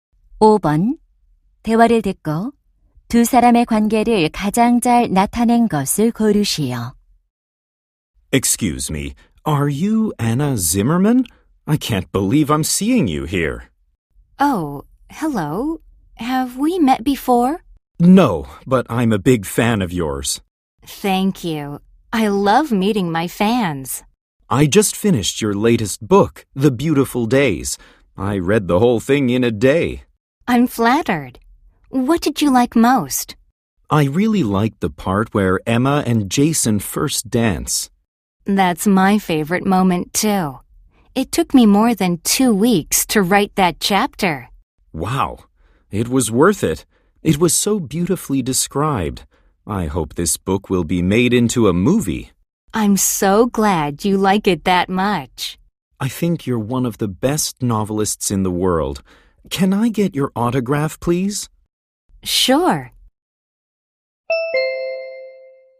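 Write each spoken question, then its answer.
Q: 대화를 듣고 두 사람의 관계를 가장 잘 나타낸 것을 고르시오.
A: 독자(팬) - 소설가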